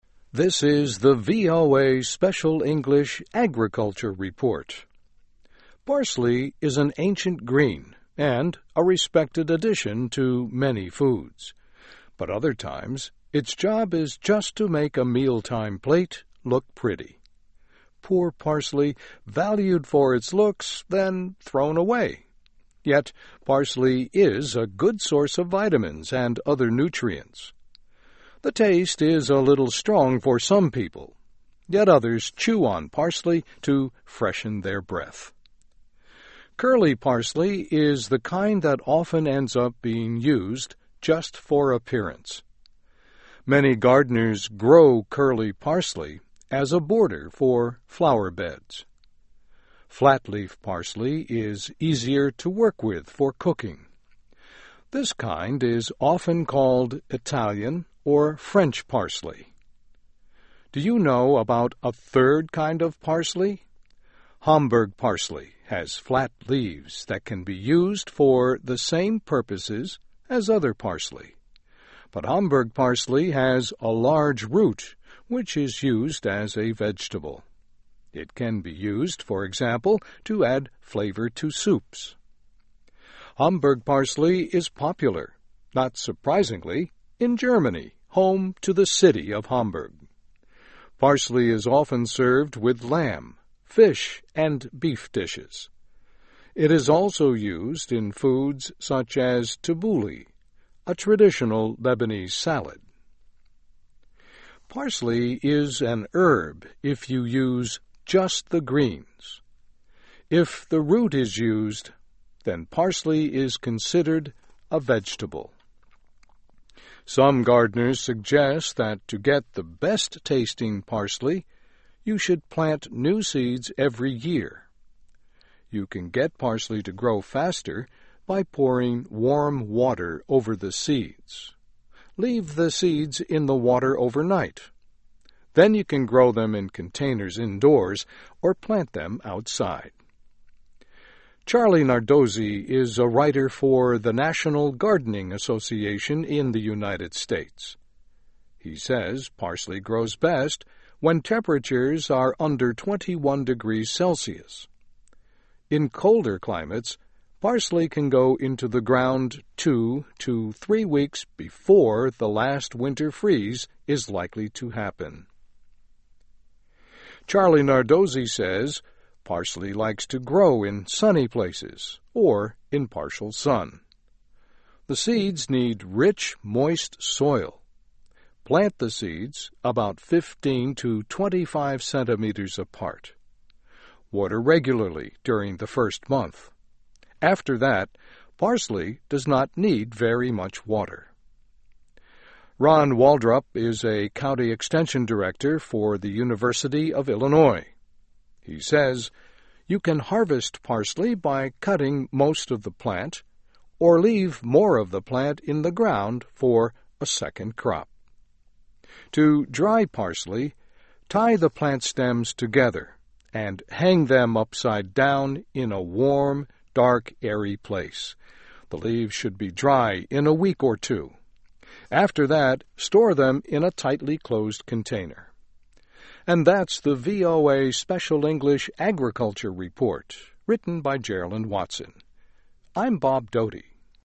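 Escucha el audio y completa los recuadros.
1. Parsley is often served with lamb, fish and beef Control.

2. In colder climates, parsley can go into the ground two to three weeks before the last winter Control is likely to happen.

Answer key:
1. dishes
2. freeze

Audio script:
This the VOA Special English Agriculture Report.
Parsley is an ancient green and a respected addition to many foods. But other times, its job is just to make a Control plate look pretty. Poor parsley, valued for its looks, then thrown away.
Yet parsley is a good source of vitamins and other Control. The taste is a little strong for some people, yet others chew on parsley to freshen their breath.
Curly parsley is the kind that often ends up being used just for appearance. Many gardeners grow Control parsley as a border for flowerbeds.
Flat-leaf parsley is easier to work with for cooking. This kind is often called Italian or French parsley.
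Do you know about a third kind of parsley? Hamburg parsley has flat leaves that can be used for the same purposes as other parsley. But Hamburg parsley has a large Control which is used as a vegetable. It can be used, for example, to add flavor to soups.
Hamburg parsley is popular, not surprisingly, in Germany, home to the city of Hamburg.
It is also used in foods such as tabouli, a traditional Lebanese salad.
Parsley is an herb if you use just the greens. If the root is used, then parsley is considered a vegetable.
Some gardeners suggest that to get the best tasting parsley, you should plant new seeds every year. You can get parsley to grow faster by Control warm water over the seeds. Leave the seeds in the water overnight. Then you can grow them in containers indoors or plant them outside.
Charlie Nardozzi is a writer for the National Gardening Association in the United States. He says parsley grows best when temperatures are under twenty-one degrees Celsius.
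Charlie Nardozzi says parsley likes to grow in sunny places or in partial sun. The seeds need rich, Control soil. Plant the seeds about fifteen to twenty-five centimeters apart. Water regularly during the first month. After that, parsley does not need very much water.
Ron Waldrop is a county extension director for the University of Illinois. He says you can harvest parsley by Control most of the plant, or leave more of the plant in the ground for a second crop.
To dry parsley, Control the plant stems together and hang them upside down in a warm, dark, airy place. The leaves should be dry in a week or two. After that, store them in a tightly closed container.

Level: Nivel Intermedio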